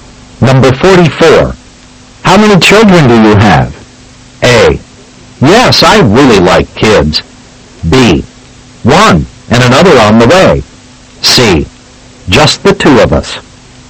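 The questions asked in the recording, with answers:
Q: How many children do you have?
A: B: One, and another on the way.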